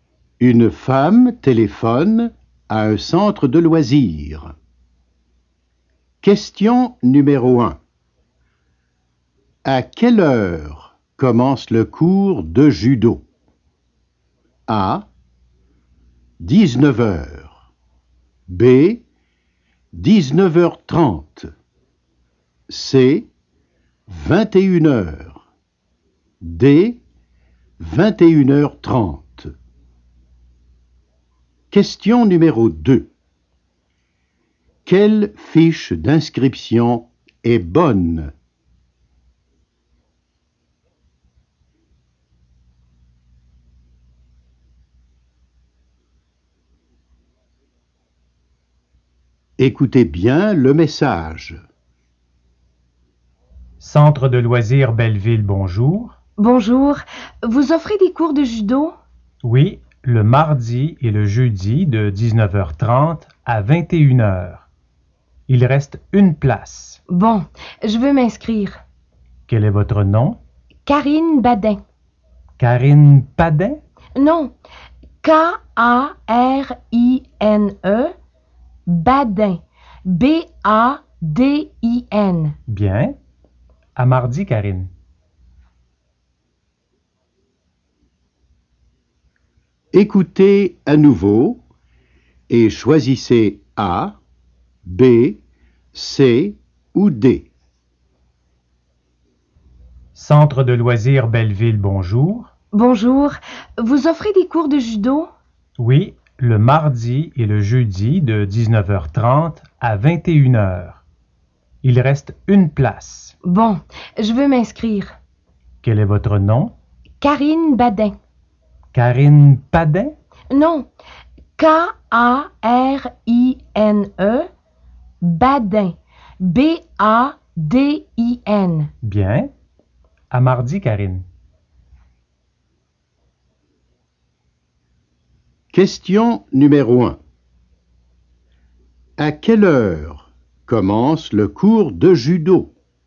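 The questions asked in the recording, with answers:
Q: À quelle heure commence le cours de judo?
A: B: 19h30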